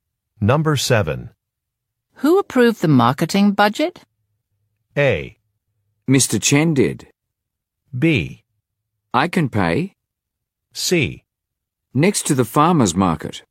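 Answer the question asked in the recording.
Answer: A: Mr. Chen did.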